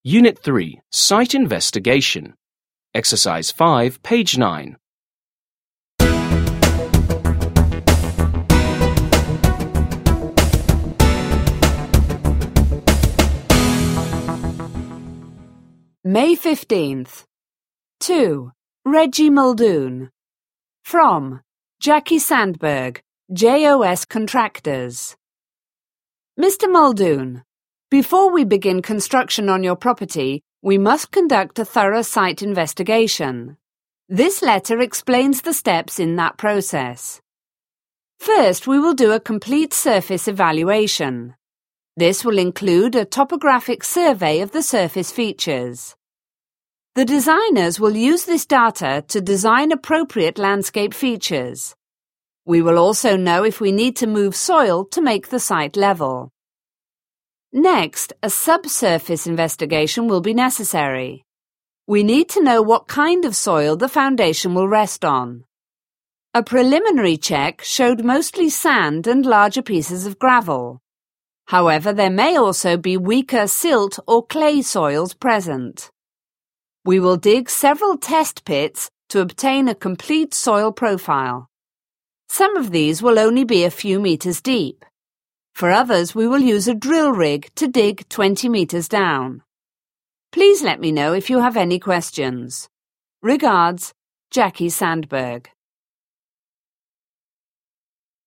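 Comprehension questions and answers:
5. Listen and read the letter from a contractor to a landowner again. What does the surface evaluation consist of?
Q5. What does the surface evaluation consist of?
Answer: A topographic survey of the surface features, to design landscape features and to know if soil must be moved to make the site level.

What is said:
Unit 3. Site investigation
(Letter)
Mr. Muldoon,
Before we begin construction on your property, we must conduct a thorough site investigation. This letter explains the steps in that process.
First, we will do a complete surface evaluation. This will include a topographic survey of the surface features. The designers will use this data to design appropriate landscape features. We will also know if we need to move soil to make the site level.
Next, a subsurface investigation will be necessary. We need to know what kind of soil the foundation will rest on. 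A preliminary check showed mostly sand and larger pieces of gravel. However, there may also be weaker silt or clay soils present. We will dig several test pits to obtain a complete soil profile. Some of these will only be a few meters deep. For others we will use a drill rig to dig twenty meters down.
Please let me know if you have any questions.
Regards,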